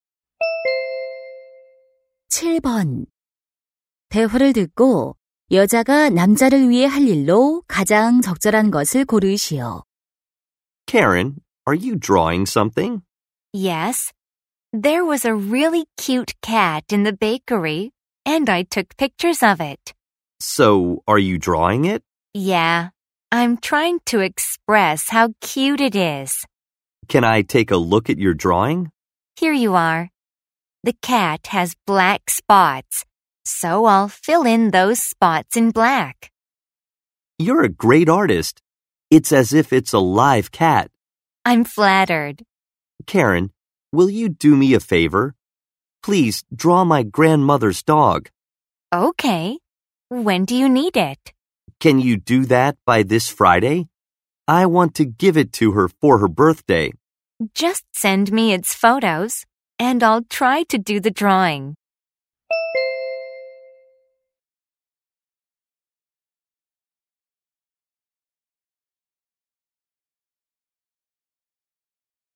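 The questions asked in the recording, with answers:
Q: 대화를 듣고 여자가 남자를 위해 할 일로 가장 적절한 것을 고르시오.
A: 남자 할머니의 개 그림 그려 주기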